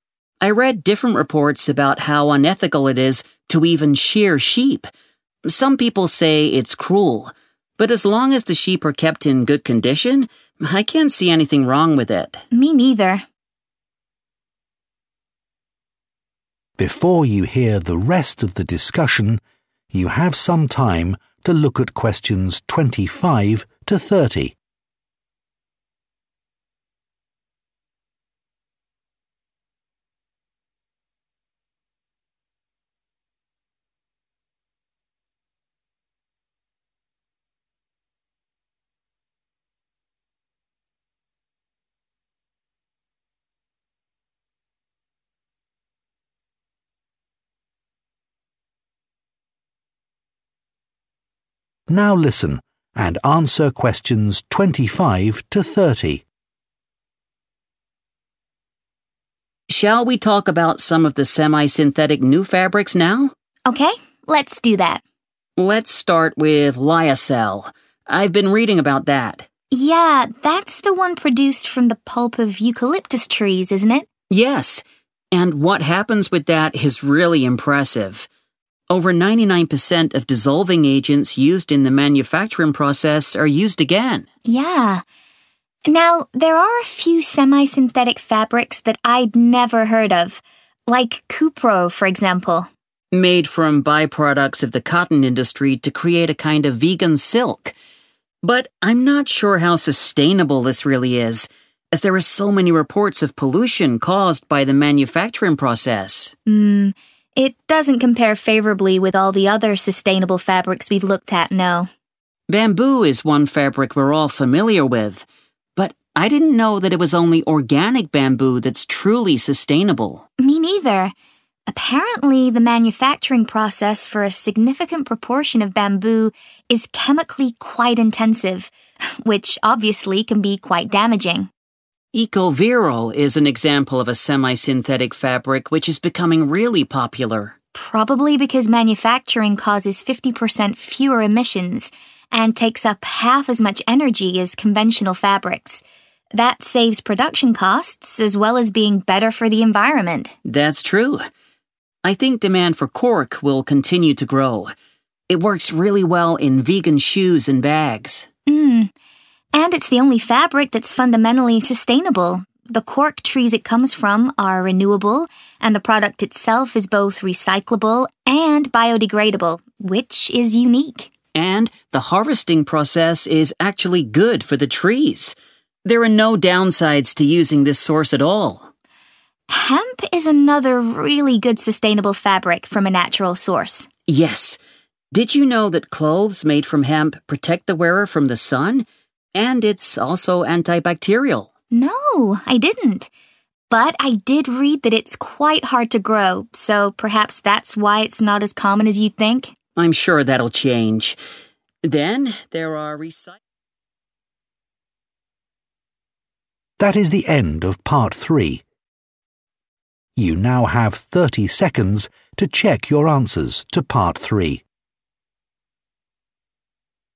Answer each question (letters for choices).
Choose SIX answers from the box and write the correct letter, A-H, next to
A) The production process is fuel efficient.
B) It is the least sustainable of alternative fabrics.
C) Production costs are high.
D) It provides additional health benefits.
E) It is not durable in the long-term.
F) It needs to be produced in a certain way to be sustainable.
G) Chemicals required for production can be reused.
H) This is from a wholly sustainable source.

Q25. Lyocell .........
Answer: G

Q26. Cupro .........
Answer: B

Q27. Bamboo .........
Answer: F

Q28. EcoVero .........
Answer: A

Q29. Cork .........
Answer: H

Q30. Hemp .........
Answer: D

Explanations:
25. Hơn 99% hóa chất được dùng lại sau quá trình sản xuất.
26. Sinh viên 2 nhắc đến việc Cupro có thể không bền vững, bởi vì có báo cáo về việc nó gây ra nhiều ô nhiễm trong quá trình sản xuất, và sinh viên khẳng định điều này một lần nữa, cho rằng Cupro không thể so sánh với những loại vải thay thế khác
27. Nếu quy trình sản xuất sử dụng quá nhiều hóa chất thì không bền vững, nên chỉ bền vững khi được sản xuất đúng cách.
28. Quy trình sản xuất chỉ dùng một nửa năng lượng so với vải thông thường, vậy nên đây là một quy trình sản xuất tiết kiệm năng lượng.
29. Đây là loại vải hoàn toàn bền vững từ nguồn gốc.
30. Ngoài chức năng làm quần áo, chất liệu này còn chống tia nắng và kháng khuẩn, tức là mang lại lợi ích cho sức khỏe.

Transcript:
But I wasn't convinced by the argument that wool production is sustainable because it doesn't use many chemicals. What about all the fungicides and insecticides used in sheep farming?
Jan: Good point. And I couldn't find any evidence for the claim about sheep farming being better for the environment than cattle farming.
Jack: No, they're both really bad. I read different reports about how unethical it is to even shear sheep. Some people say it's cruel, but as long as the sheep are kept in good conditions, I can't see anything wrong with it.
Jan: Me neither.
Before you hear the rest of the discussion, you have some time to look at questions 25 to 30.
Now listen and answer questions 25 to 30.
Jack: Shall we talk about some of the semi-synthetic new fabrics now?
Jan: Okay, let's do that.
Jack: Let's start with Lyocell. I've been reading about that.
Jan: Yeah, that's the one produced from the pulp of eucalyptus trees, isn't it?
Jack: Yes! And what happens with that is really impressive. Over 99% of dissolving agents used in the manufacturing process are used again.
Jan: Yeah. Now, there are a few semi-synthetic fabrics that I'd never heard of, like Cupro, for example.
Jack: Made from by-products of the cotton industry to create a kind of vegan silk. But I'm not sure how sustainable this really is, as there are so many reports of pollution caused by the manufacturing process.
Jan: Mmm, it doesn't compare favorably with all the other sustainable fabrics we've looked at, no.
Jack: Bamboo is one fabric we're all familiar with, but I didn't know that it was only organic bamboo that's truly sustainable.
Jan: Me neither. Apparently, the manufacturing process for a significant proportion of bamboo is chemically quite intensive, which obviously can be quite damaging.
Jack: EcoVero is an example of a semi-synthetic fabric which is becoming really popular.
Jan: Probably because manufacturing causes 50% fewer emissions and takes up half as much energy as conventional fabrics. That saves production costs as well as being better for the environment.
Jack: That's true. I think demand for cork will continue to grow. It works really well in vegan shoes and bags.
Jan: Mmm, and it's the only fabric that's fundamentally sustainable. The cork trees it comes from are renewable, and the product itself is both recyclable and biodegradable, which is unique.
Jack: And the harvesting process is actually good for the trees! There are no downsides to using this source at all.
Jan: Hemp is another really good sustainable fabric from a natural source.
Jack: Yes. Did you know that clothes made from hemp protect the wearer from the sun? And it's also anti-bacterial.
Jan: No, I didn't. But I did read that it's quite hard to grow, so perhaps that's why it's not as common as you'd think?
Jack: I'm sure that'll change. Then, there are...